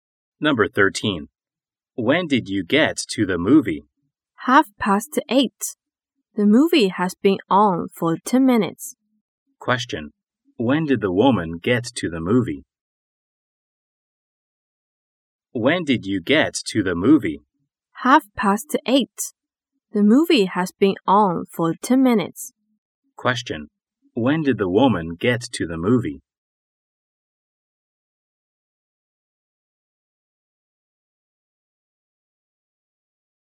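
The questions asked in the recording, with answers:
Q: When did the woman get to the movie?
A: At 8:30.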